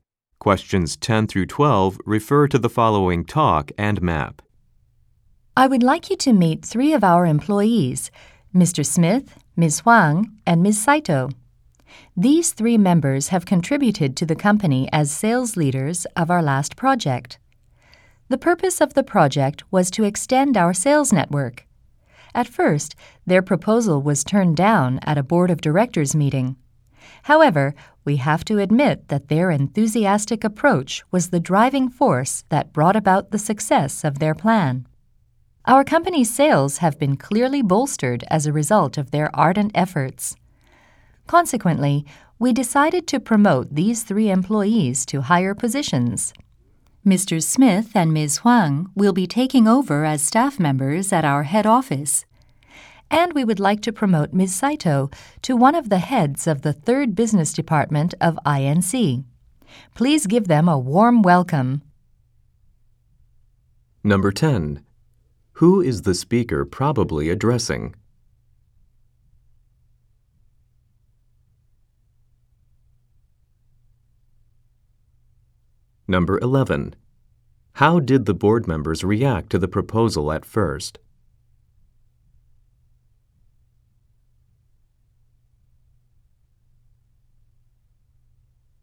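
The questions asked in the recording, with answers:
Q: How did the board members react to the proposal at first?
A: They turned it down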